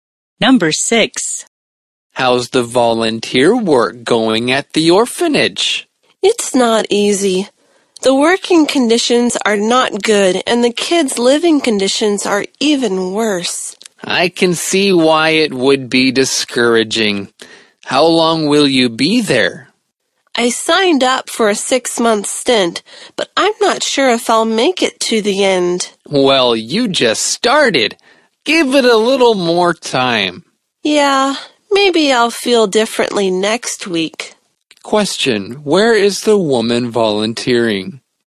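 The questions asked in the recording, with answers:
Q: where is the woman volunteering?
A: At an orphanage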